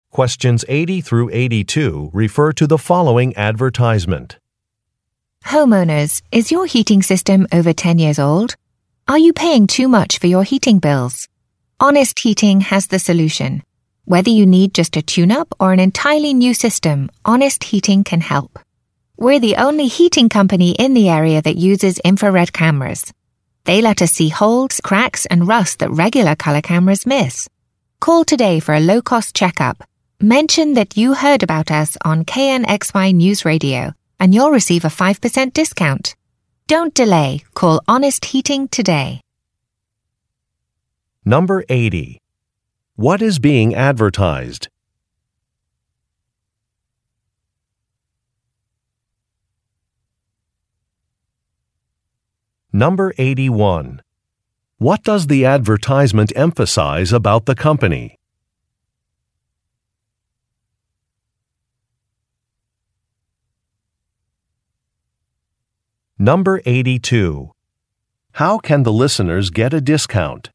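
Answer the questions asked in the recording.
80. A heating company's services
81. It is the only one in the area using infrared cameras
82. By mentioning they heard about it on KNXY News Radio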